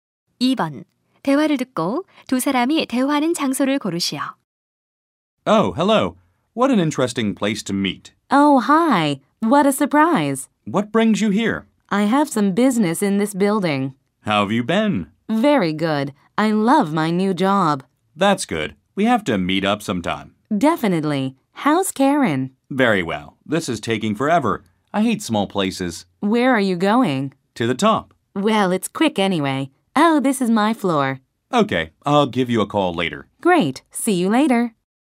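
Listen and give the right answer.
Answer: 엘리베이터 안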